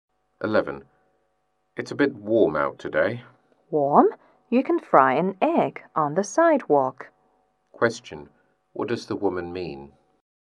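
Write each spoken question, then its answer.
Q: What does the woman mean?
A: It's very hot today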